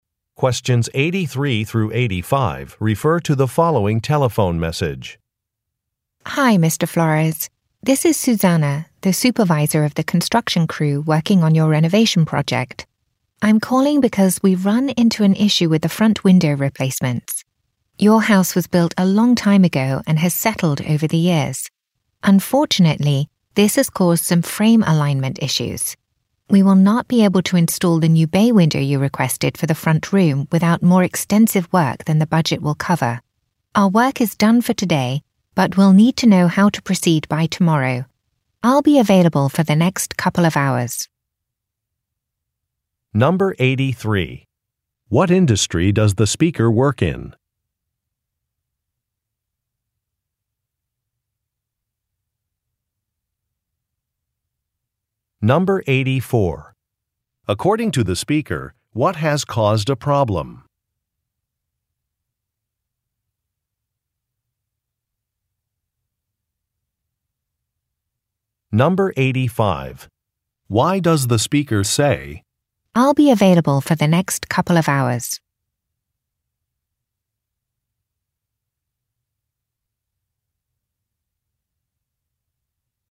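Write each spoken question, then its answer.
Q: What industry does the speaker work in?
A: Construction

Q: According to the speaker, what has caused a problem?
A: The house has settled over the years, causing frame alignment issues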